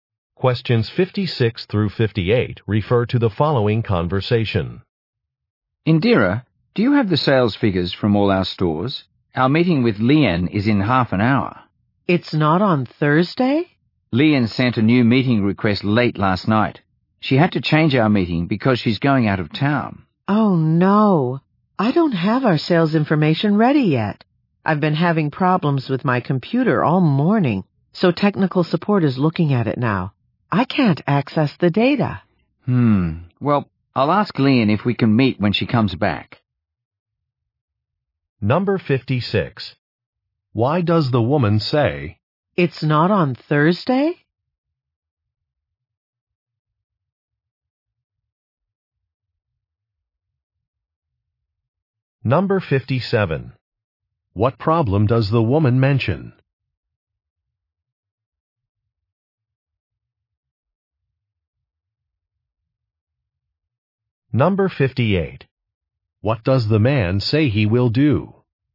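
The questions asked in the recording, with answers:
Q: Why does the woman say,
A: She is surprised the meeting has been moved earlier

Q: What problem does the woman mention?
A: Her computer isn't working, so she can't get the data

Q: What does the man say he will do?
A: Ask Lian to meet when she comes back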